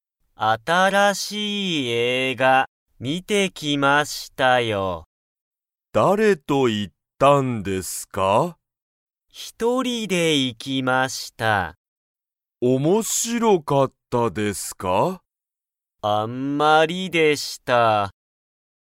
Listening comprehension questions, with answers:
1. 新(あたら)しい映画(えいが)は面白(おもしろ)かったですか?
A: いいえ

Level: Level 1